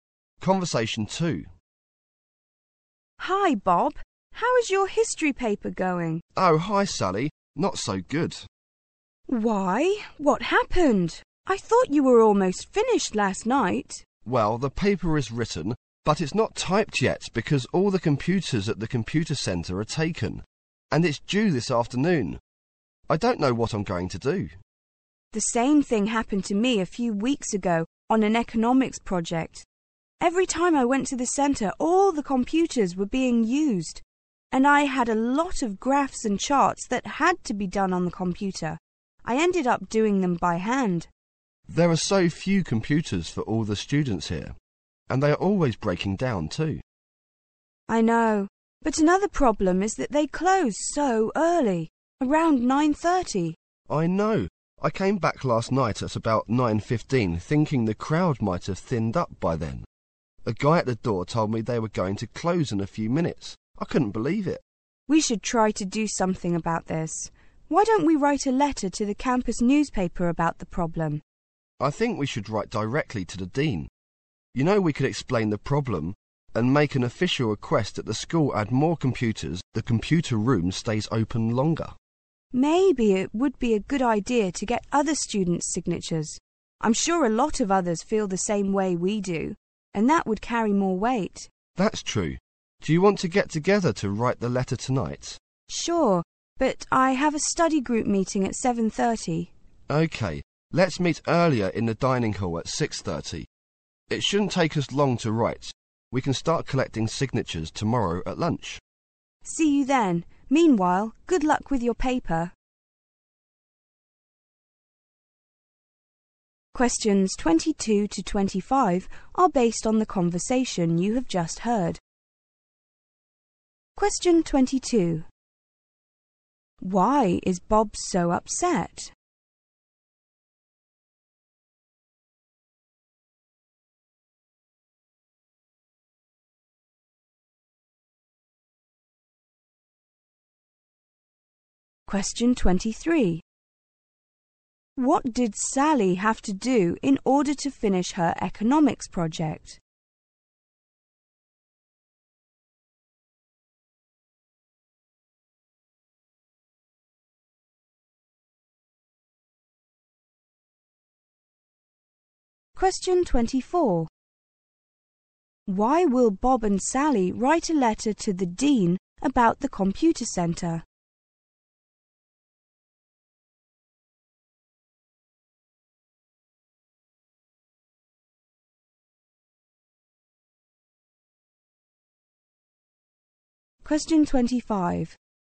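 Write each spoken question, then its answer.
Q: Why is Bob so upset?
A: His paper is due this afternoon but isn't typed, because all the computers are taken.

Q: What did Sally have to do in order to finish her economics project?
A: Draw the graphs and charts by hand

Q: Why will Bob and Sally write a letter to the dean about the computer centre?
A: To ask for more computers and longer opening hours

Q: Why doesn't Sally have much time to work on the letter tonight?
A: She has a study group meeting at 7:30.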